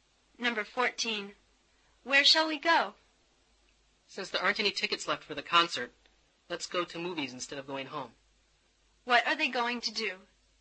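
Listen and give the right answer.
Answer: Go to the movies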